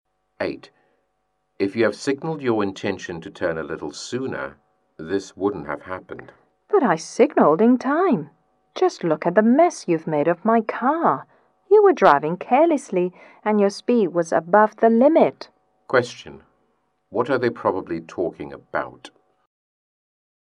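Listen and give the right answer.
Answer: A car accident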